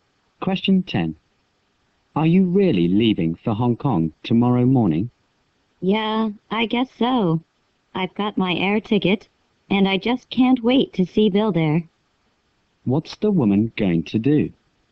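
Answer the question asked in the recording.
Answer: Fly to Hong Kong to see Bill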